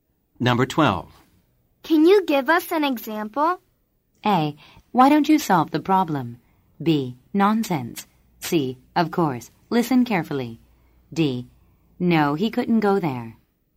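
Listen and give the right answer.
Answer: C: Of course.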